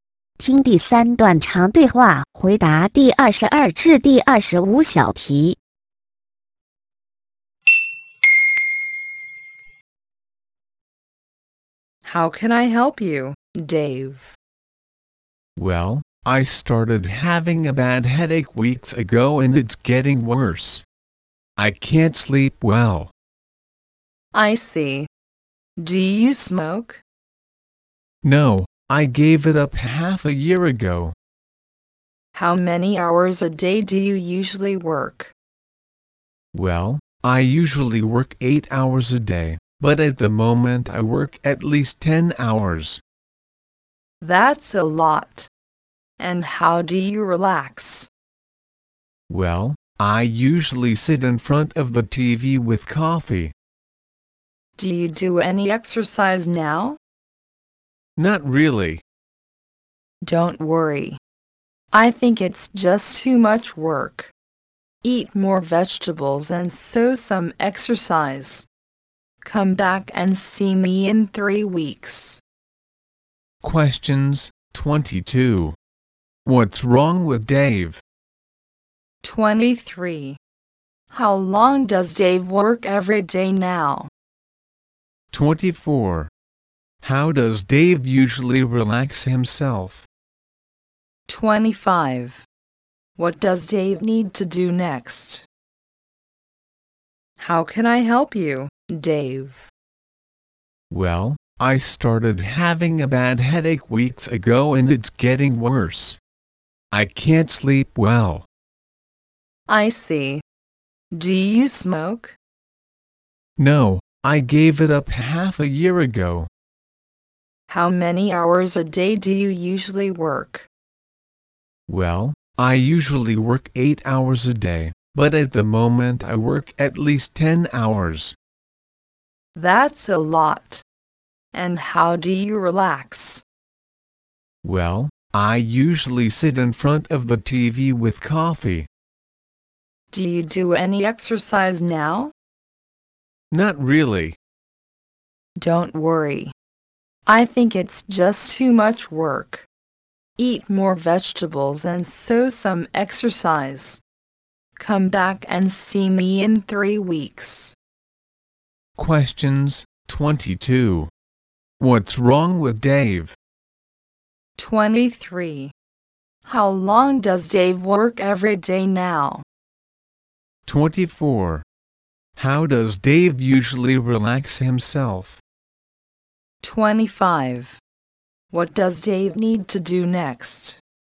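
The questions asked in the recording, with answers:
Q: What's wrong with Dave?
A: He has a bad headache

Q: How long does Dave work every day now?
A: At least 10 hours

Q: How does Dave usually relax himself?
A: He sits in front of the TV with coffee

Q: What does Dave need to do next?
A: Eat more vegetables and do some exercise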